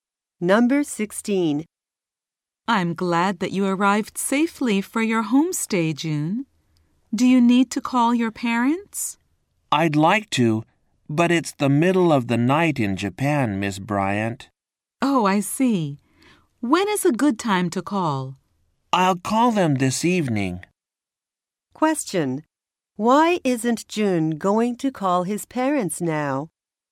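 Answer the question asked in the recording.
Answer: It's the middle of the night in Japan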